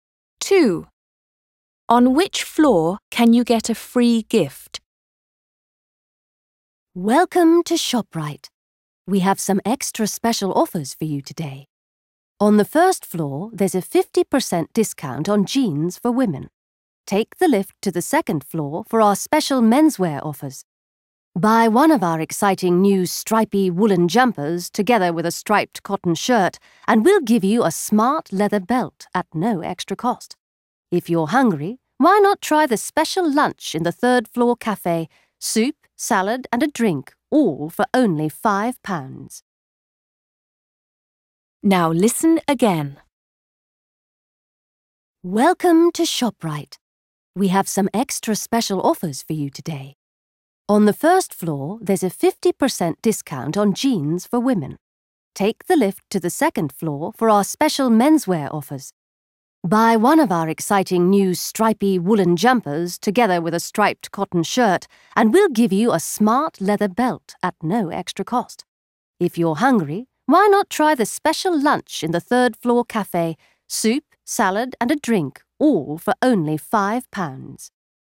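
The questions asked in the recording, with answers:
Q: On which floor can you get a free gift?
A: the second floor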